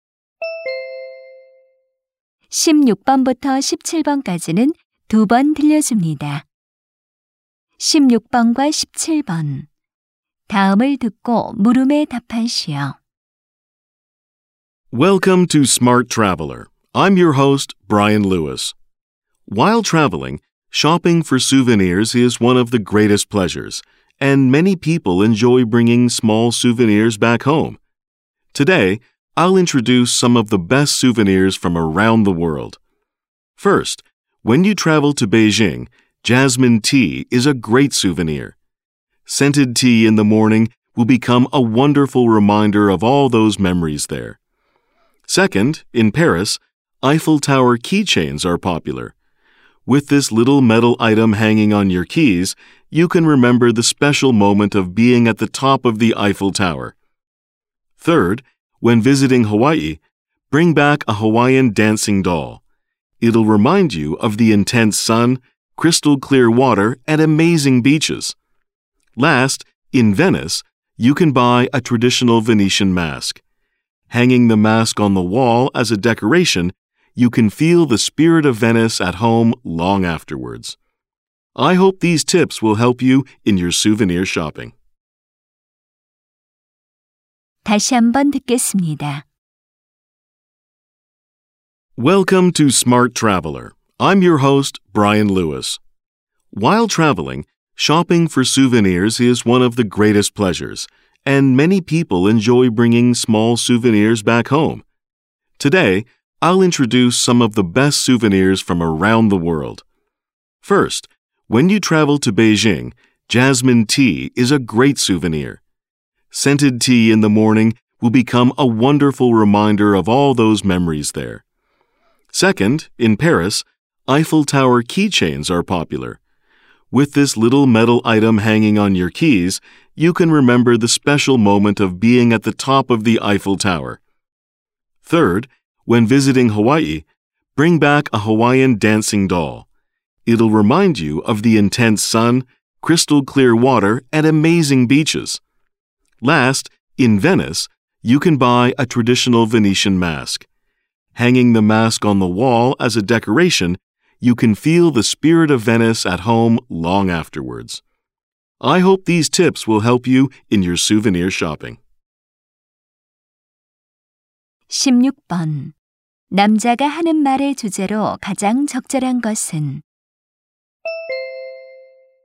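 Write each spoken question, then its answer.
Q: 남자가 하는 말의 주제로 가장 적절한 것은?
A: 세계 여러 지역의 추천 기념품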